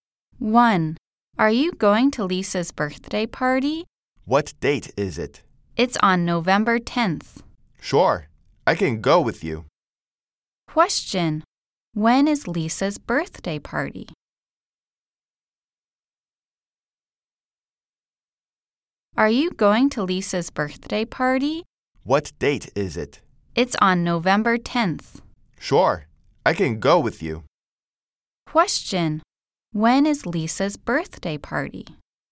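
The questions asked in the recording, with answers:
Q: Question: When is Lisa's birthday party?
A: On November 10th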